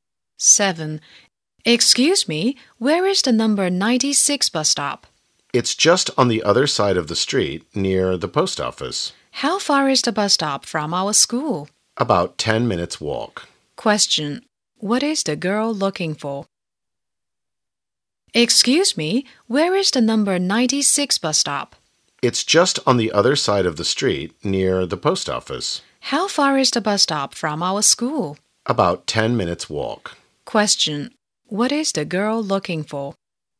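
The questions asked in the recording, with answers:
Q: What is the girl looking for?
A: The number 96 bus stop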